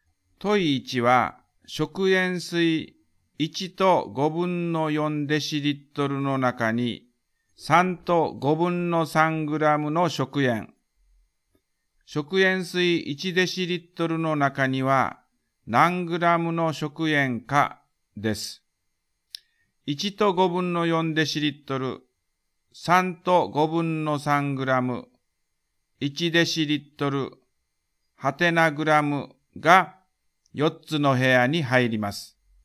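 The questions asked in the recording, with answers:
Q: 問1は食塩水1と5分の4デシリットルの中に3と5分の3グラムの食塩。食塩水1デシリットルの中には何グラムの食塩かです。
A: 2グラム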